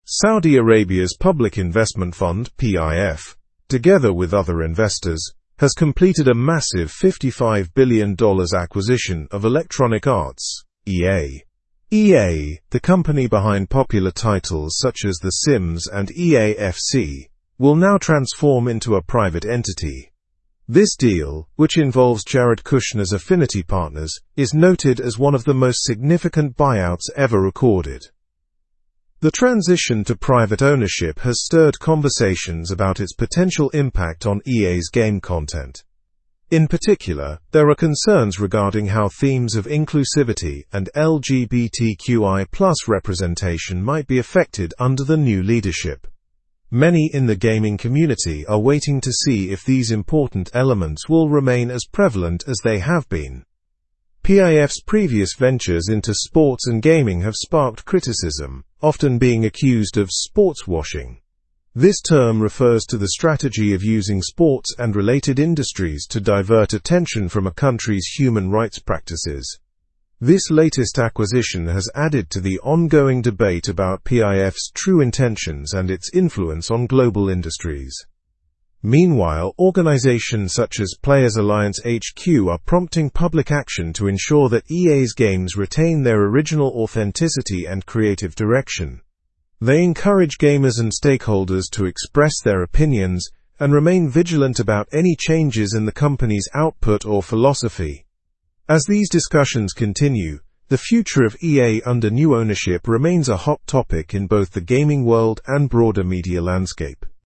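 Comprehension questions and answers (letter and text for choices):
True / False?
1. The Sims and EA FC are obscure titles from EA.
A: False

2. PIF is praised for sportswashing.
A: False

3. EA will remain a public company after the buyout.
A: False

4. Jared Kushner's Affinity Partners is involved in the acquisition.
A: True

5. There are concerns about inclusivity and LGBTQI+ themes under new ownership.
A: True

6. PIF sold EA for $55 billion.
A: False

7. Players Alliance HQ encourages action against the sale.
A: True

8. Public action is recommended to preserve EA's authenticity.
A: True

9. How much did the acquisition of EA cost?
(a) $60 billion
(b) $50 billion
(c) $45 billion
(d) $55 billion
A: (d) $55 billion

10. What type of company will EA become after the buyout?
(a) Public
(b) Non-profit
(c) Private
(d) Government-owned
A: (c) Private

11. Which games are mentioned in the article as popular titles from EA?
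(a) The Sims and EA FC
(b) FIFA and Madden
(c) Call of Duty and Fortnite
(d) Minecraft and Apex Legends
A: (a) The Sims and EA FC

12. What is a concern about EA's game content after the buyout?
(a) Prices of games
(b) Themes of inclusivity and LGBTQI+ representation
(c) Availability on platforms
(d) Technical performance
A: (b) Themes of inclusivity and LGBTQI+ representation

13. What term describes PIF's use of sports to distract from issues?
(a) Sportswashing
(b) Game shifting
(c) Sport distracting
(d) Game cleaning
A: (a) Sportswashing

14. Who encourages public action against the sale?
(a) EA Sports Fans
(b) Game Developers Union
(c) Players Alliance HQ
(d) Sports Player Coalition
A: (c) Players Alliance HQ

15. What impact are critics worried about regarding EA's games?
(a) Increased loading times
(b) Loss of authenticity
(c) Higher prices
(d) Smaller download sizes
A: (b) Loss of authenticity

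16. Which organization's involvement in the acquisition is mentioned?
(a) EA Investors League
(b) Global Gaming Partners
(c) Electronic Sports Investors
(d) Affinity Partners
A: (d) Affinity Partners

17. What is the monetary value of EA's acquisition?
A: The acquisition of EA is valued at $55 billion.

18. With whom did PIF collaborate to acquire EA?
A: PIF collaborated with Jared Kushner's Affinity Partners.

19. What will be EA's new status after the acquisition?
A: EA will become a private company.

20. What concern is there about EA's game content after the buyout?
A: How themes of inclusivity and LGBTQI+ representation might be affected

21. What is sportswashing?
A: Using sports to divert attention from a country's human rights practices

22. How have critics responded to the acquisition of EA by PIF?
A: They worry about EA's games losing their authenticity

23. Which organization is urging public action against the sale?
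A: Players Alliance HQ

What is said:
Saudi Arabia's Public Investment Fund (PIF), together with other investors, has completed a massive $55 billion acquisition of Electronic Arts (EA). EA, the company behind popular titles such as The Sims and EA FC, will now transform into a private entity. This deal, which involves Jared Kushner's Affinity Partners, is noted as one of the most significant buyouts ever recorded.
The transition to private ownership has stirred conversations about its potential impact on EA's game content. In particular, there are concerns regarding how themes of inclusivity and LGBTQI+ representation might be affected under the new leadership. Many in the gaming community are waiting to see if these important elements will remain as prevalent as they have been.
PIF's previous ventures into sports and gaming have sparked criticism, often being accused of "sportswashing." This term refers to the strategy of using sports and related industries to divert attention from a country's human rights practices. 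This latest acquisition has added to the ongoing debate about PIF's true intentions and its influence on global industries.
Meanwhile, organizations such as Players Alliance HQ are prompting public action to ensure that EA's games retain their original authenticity and creative direction. They encourage gamers and stakeholders to express their opinions and remain vigilant about any changes in the company's output or philosophy. As these discussions continue, the future of EA under new ownership remains a hot topic in both the gaming world and broader media landscape.

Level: Level 3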